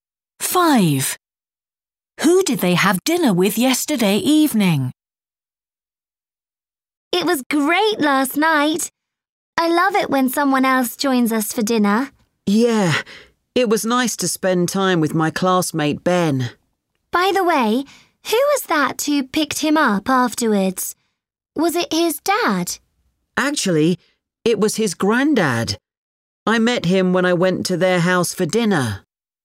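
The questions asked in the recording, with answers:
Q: Who did they have dinner with yesterday evening?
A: Ben, a classmate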